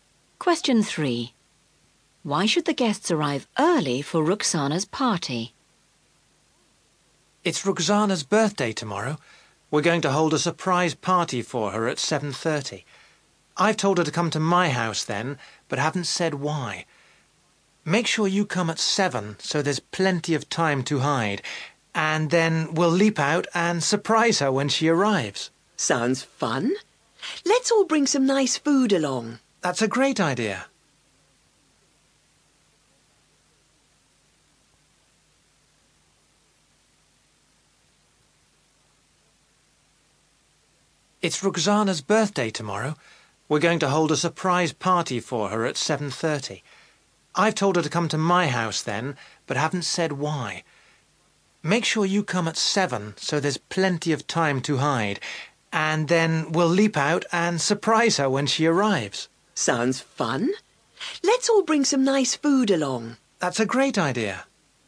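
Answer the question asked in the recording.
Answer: So there's plenty of time to hide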